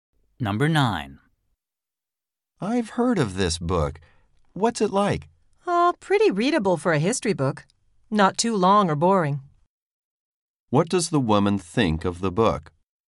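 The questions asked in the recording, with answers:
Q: What does the woman think of the book?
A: It is readable, not too long or boring.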